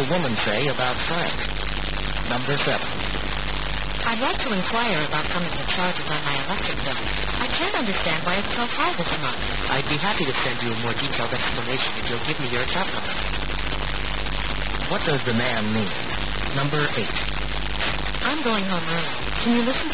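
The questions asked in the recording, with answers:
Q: What does the man mean?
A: He needs her account number to send an explanation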